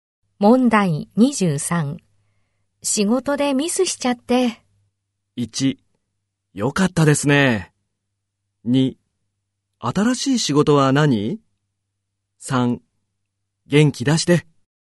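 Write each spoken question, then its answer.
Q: 仕事でミスしちゃって。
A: 3: 元気出して。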